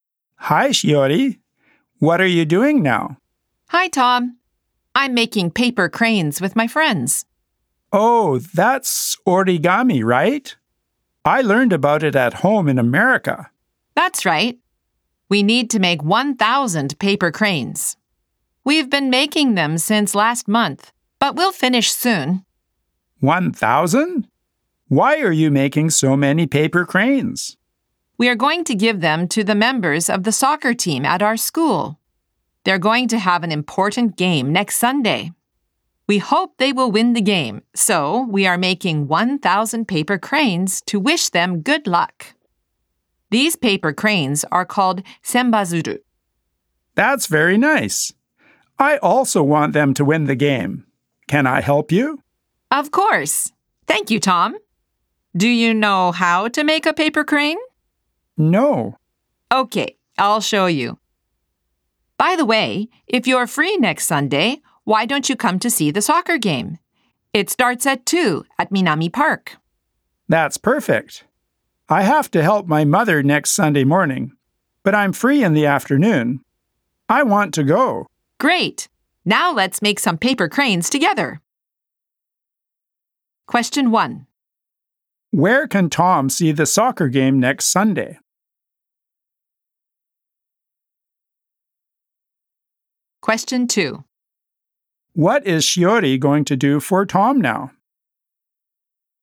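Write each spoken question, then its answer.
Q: Where can Tom see the soccer game next Sunday?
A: At Minami Park.

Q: What is Shiori going to do for Tom now?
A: Show him how to make a paper crane.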